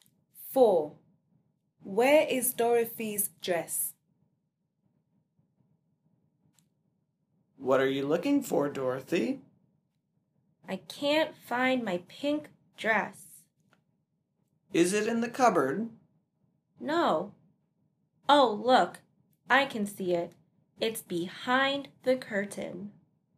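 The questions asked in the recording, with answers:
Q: Where is Dorothy's dress?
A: Behind the curtain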